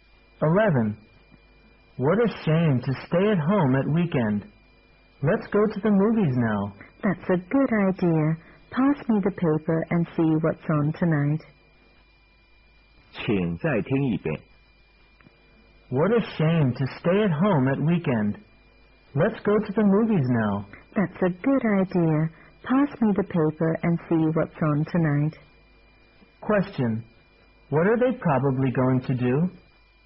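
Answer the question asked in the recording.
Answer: Go to the movies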